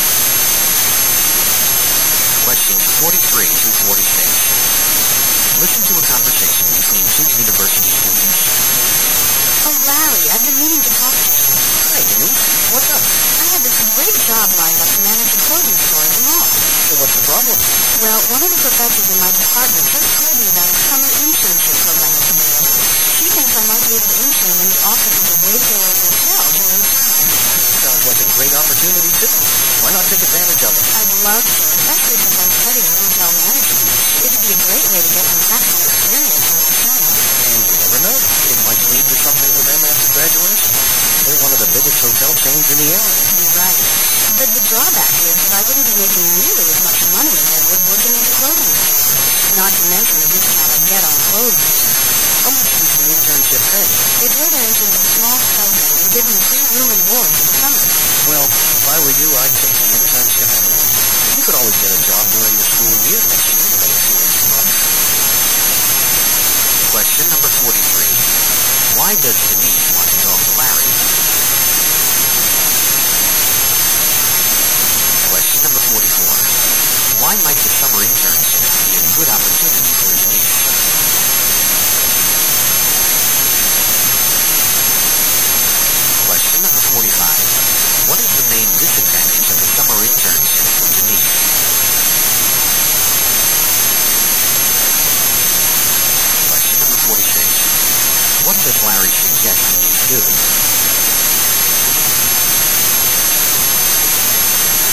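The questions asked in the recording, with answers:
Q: Why does Denise want to talk to Larry?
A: To get advice on choosing between a store job and an internship

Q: Why might the summer internship be a good opportunity for Denise?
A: It gives practical experience in hotel management

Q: What is the main disadvantage of the summer internship for Denise?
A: It pays much less money

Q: What does Larry suggest Denise do?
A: Take the internship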